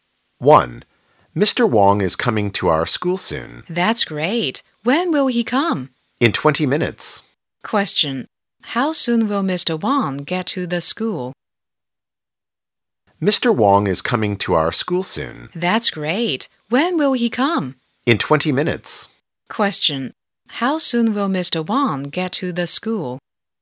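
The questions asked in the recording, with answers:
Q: How soon will Mr. Wong get to the school?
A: In 20 minutes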